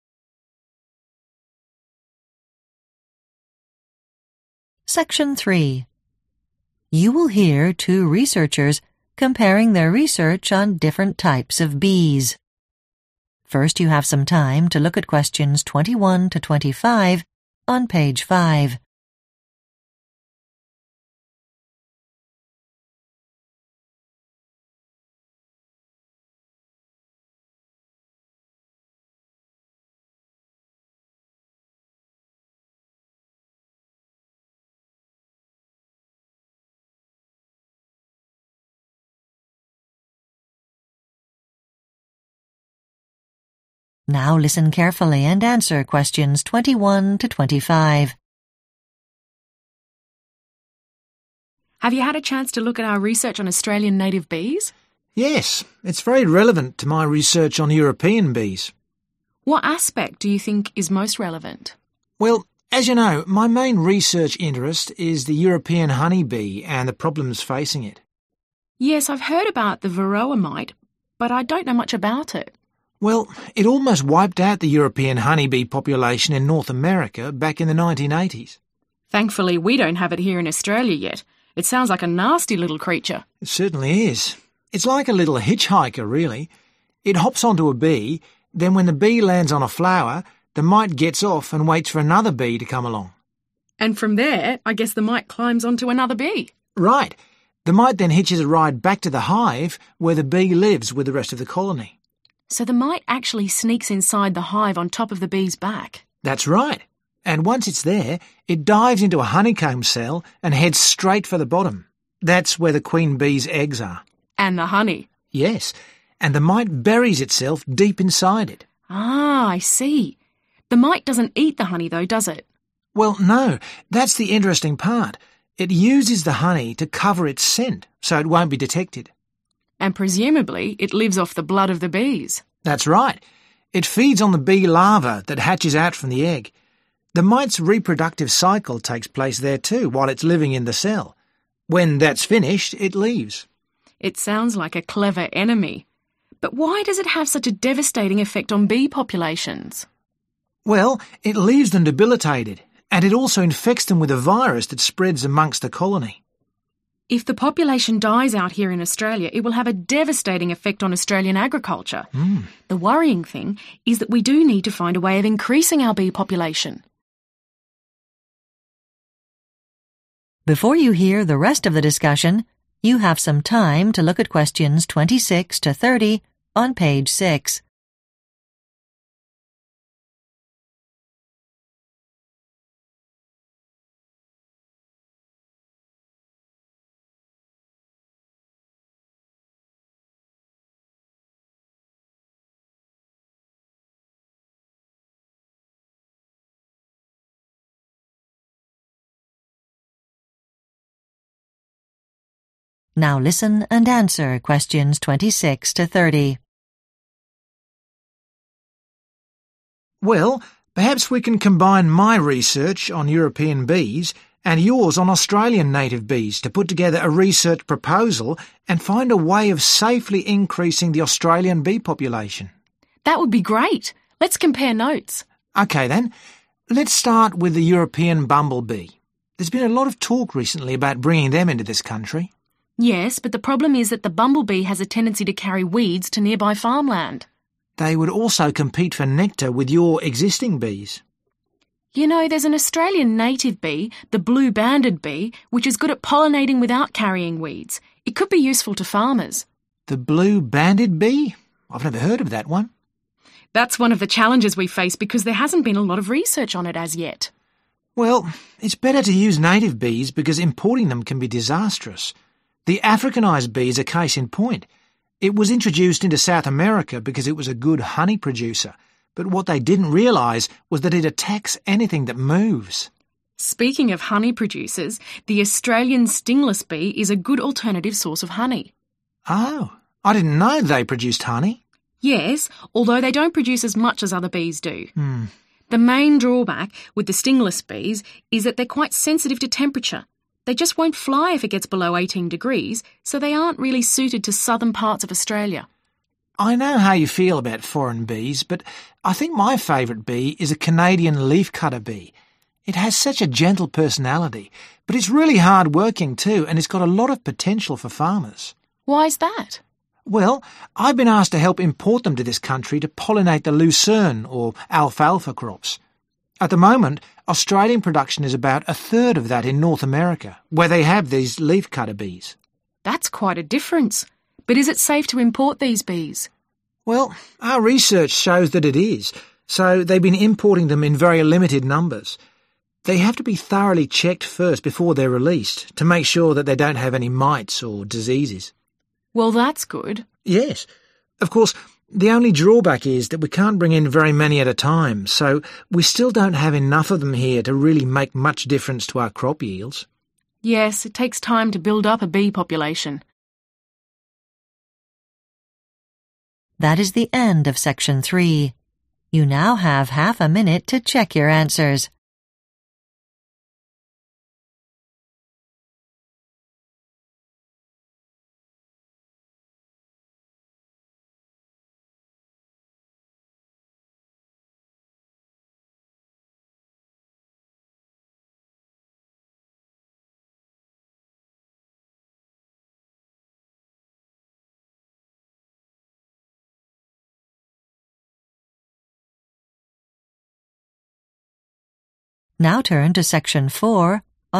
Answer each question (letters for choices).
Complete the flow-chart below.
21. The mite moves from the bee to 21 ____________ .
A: flower

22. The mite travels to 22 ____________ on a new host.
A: hive

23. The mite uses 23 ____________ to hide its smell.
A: honey

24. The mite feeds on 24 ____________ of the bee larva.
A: blood

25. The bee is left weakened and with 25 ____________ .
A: a virus

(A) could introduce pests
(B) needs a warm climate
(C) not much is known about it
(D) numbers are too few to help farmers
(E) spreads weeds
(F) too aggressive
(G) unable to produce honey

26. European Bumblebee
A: E

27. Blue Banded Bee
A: C

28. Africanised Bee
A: F

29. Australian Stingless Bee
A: B

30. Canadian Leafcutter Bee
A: D